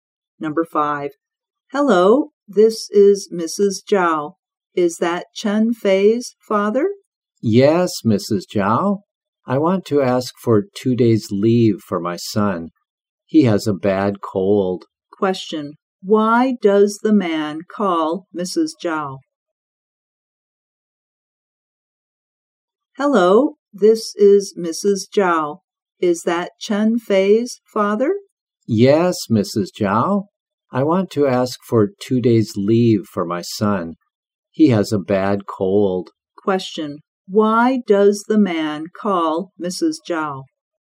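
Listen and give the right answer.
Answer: To ask for 2 days' leave for his son, who has a bad cold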